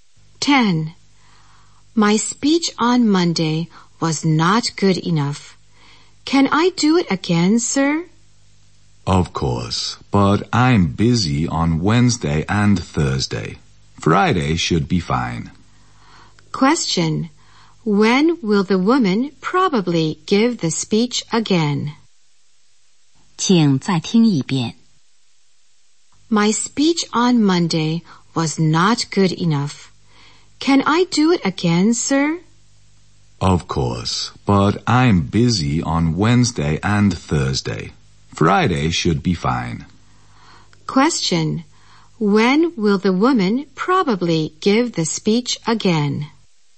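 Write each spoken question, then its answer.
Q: When will the woman probably give the speech again?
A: On Friday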